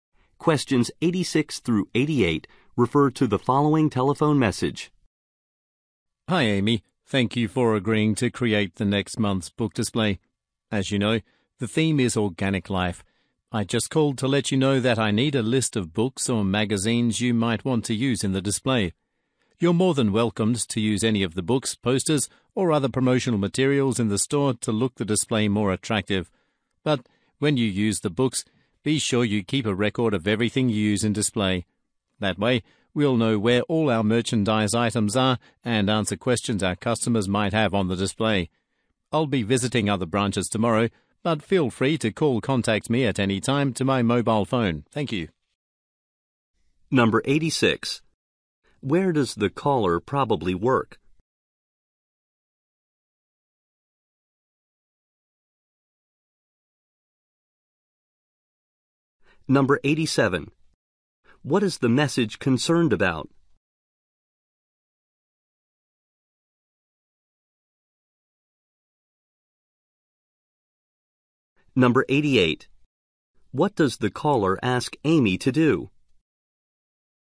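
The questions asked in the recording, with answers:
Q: Where does the caller probably work?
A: At a bookstore

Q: What is the message concerned about?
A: Next month's book display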